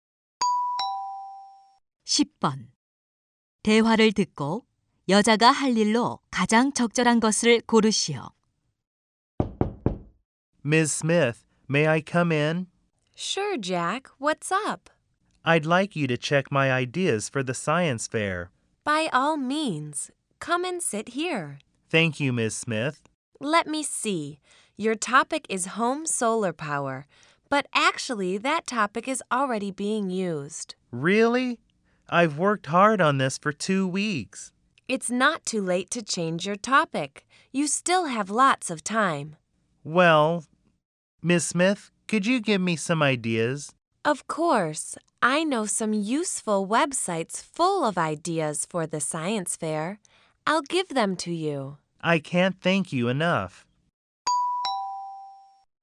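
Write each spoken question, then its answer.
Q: 대화를 듣고 여자가 할 일로 가장 적절한 것을 고르시오.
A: 과학 박람회 아이디어 웹사이트 알려 주기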